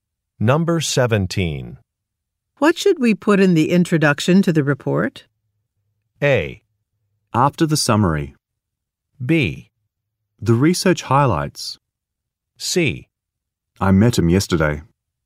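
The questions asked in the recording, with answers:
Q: What should we put in the introduction to the report?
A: B: The research highlights.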